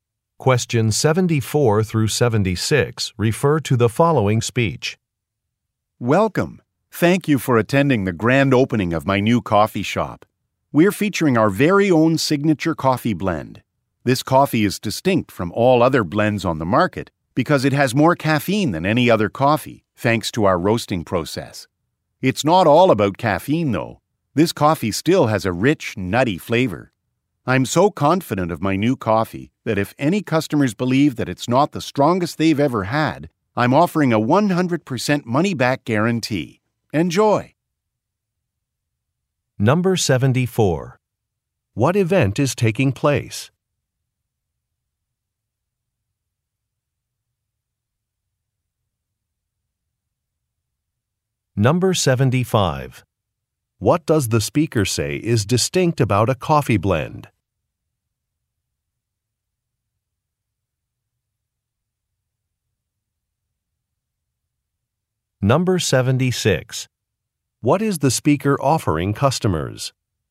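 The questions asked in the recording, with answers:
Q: What event is taking place?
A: A coffee shop grand opening

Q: What does the speaker say is distinct about a coffee blend?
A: It has more caffeine than any other coffee

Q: What is the speaker offering customers?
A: A money-back guarantee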